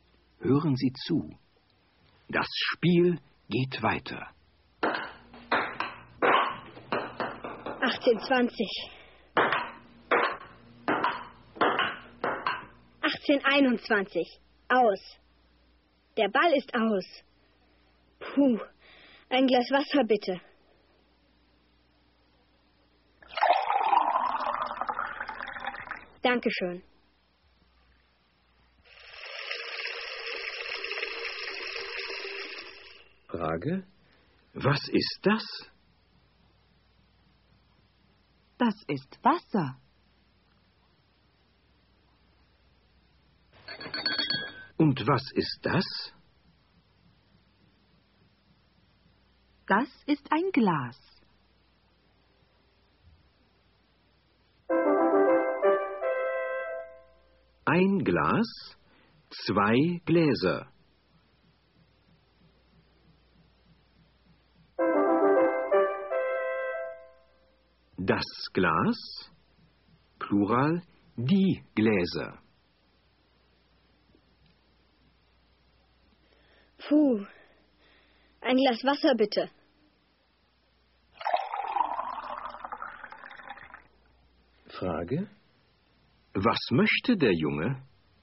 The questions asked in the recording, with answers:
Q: Frage: Was möchte der Junge?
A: Er möchte ein Glas Wasser.